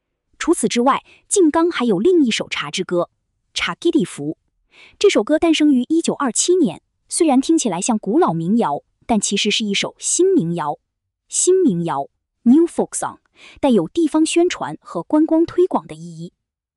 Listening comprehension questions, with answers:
《ちゃっきり節》はどのような性格の歌ですか。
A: 新民谣

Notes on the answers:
古い民謡のように聞こえるが、地方宣传・観光推広の目的で1927年に作られた「新民謡」です。